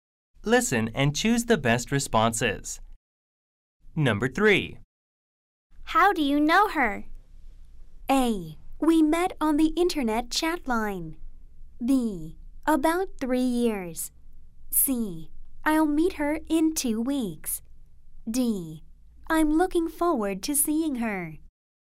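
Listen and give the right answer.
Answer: A: We met on the internet chat line.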